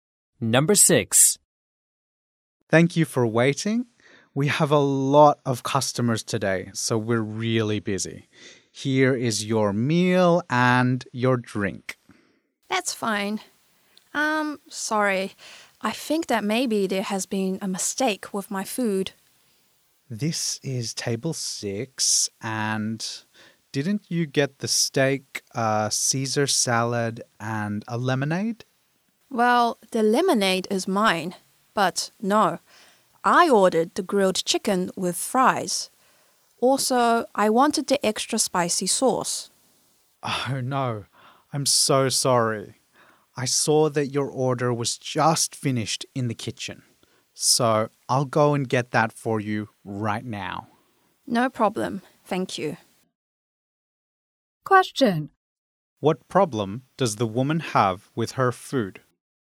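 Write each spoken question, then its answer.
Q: What problem does the woman have with her food?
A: She got the wrong meal (steak and salad instead of grilled chicken with fries)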